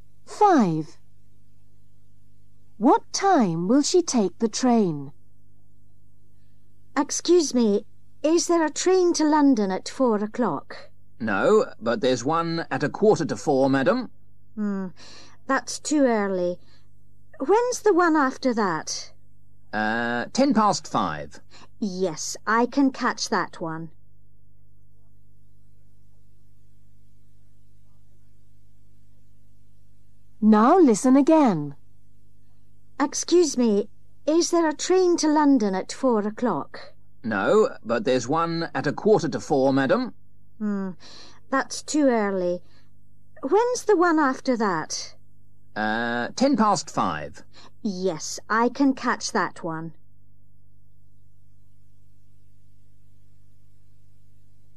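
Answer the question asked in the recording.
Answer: 5:10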